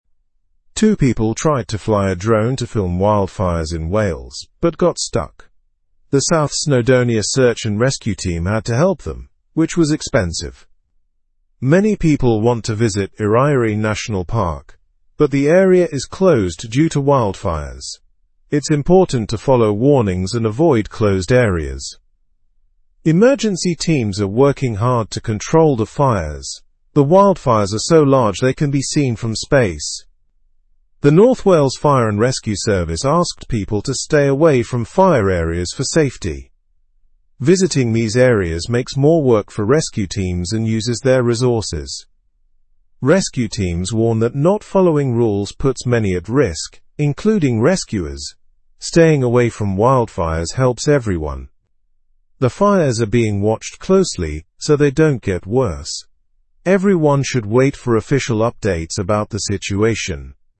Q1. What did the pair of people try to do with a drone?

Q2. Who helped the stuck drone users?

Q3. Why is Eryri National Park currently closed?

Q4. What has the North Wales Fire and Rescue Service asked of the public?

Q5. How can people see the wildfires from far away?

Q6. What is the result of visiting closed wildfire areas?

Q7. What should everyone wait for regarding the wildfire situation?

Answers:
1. They tried to film wildfires in Wales.
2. The South Snowdonia Search and Rescue Team helped them.
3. It is closed due to wildfires.
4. They asked people to stay away from the fire areas for their safety.
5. The wildfires are visible from space.
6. It creates more work for rescue teams and uses their resources.
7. They should wait for official updates about the situation.

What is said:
Two people tried to fly a drone to film wildfires in Wales, but got stuck. The South Snowdonia Search and Rescue Team had to help them, which was expensive. Many people want to visit Eryri National Park, but the area is closed due to wildfires. It's important to follow warnings and avoid closed areas.
Emergency teams are working hard to control the fires. The wildfires are so large they can be seen from space. The North Wales Fire and Rescue Service asked people to stay away from fire areas for safety. Visiting these areas makes more work for rescue teams and uses their resources.
Rescue teams warn that not following rules puts many at risk, including rescuers. Staying away from wildfires helps everyone. The fires are being watched closely so they don't get worse. Everyone should wait for official updates about the situation.

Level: Level 2